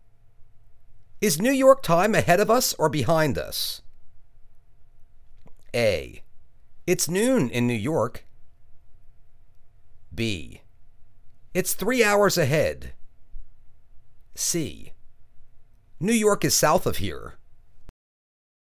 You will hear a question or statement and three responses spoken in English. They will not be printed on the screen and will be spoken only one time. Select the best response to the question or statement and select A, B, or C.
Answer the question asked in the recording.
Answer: It's three hours ahead.